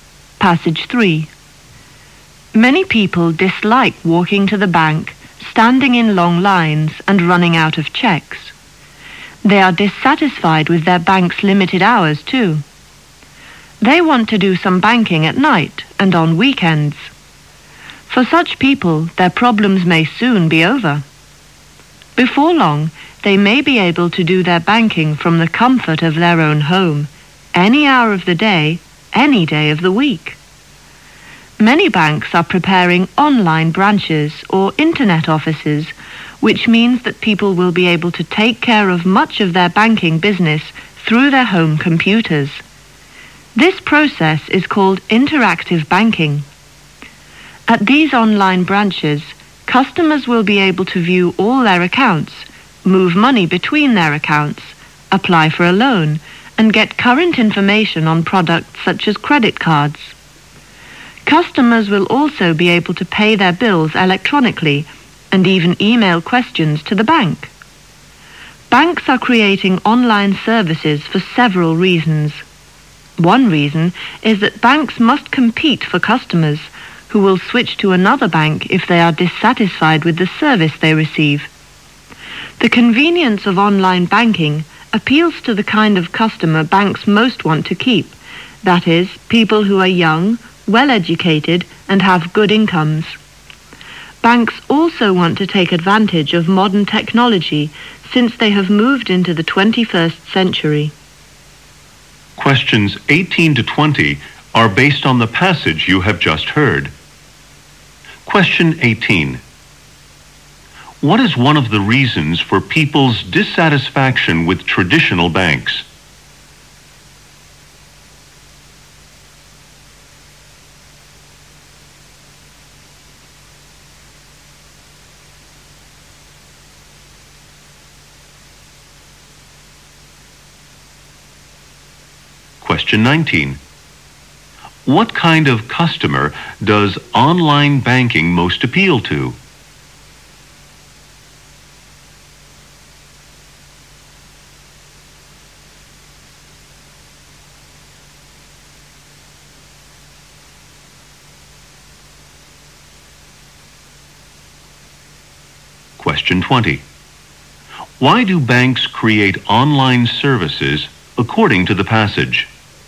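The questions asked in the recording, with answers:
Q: What is one of the reasons for people's dissatisfaction with traditional banks?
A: Limited banking hours / long lines

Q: What kind of customer does online banking most appeal to?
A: Young, well-educated people with good incomes

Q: Why do banks create online services according to the passage?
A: To compete for customers and take advantage of modern technology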